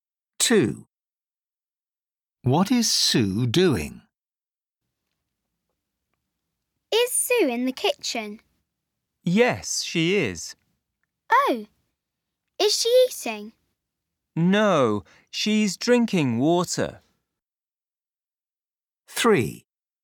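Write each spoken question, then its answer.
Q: What is Sue doing?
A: Drinking water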